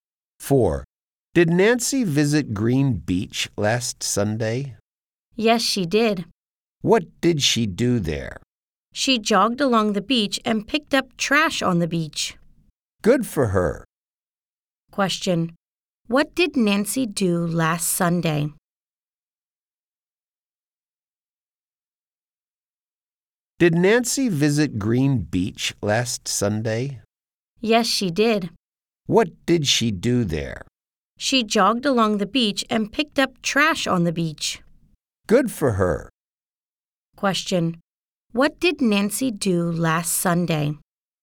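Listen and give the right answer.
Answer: She jogged along Green Beach and picked up trash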